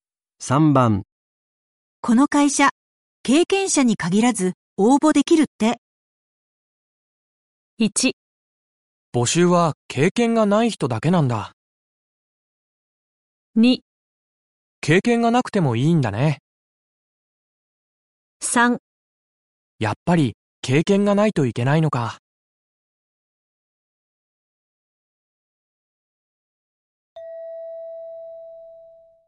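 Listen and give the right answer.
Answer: 2: 経験がなくてもいいんだね。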